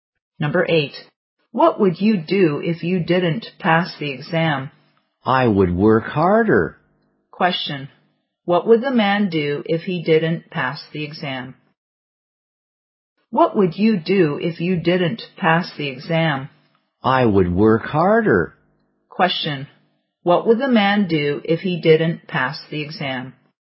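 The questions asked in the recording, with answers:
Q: Question, what would the man do if he didn't pass the exam?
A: Work harder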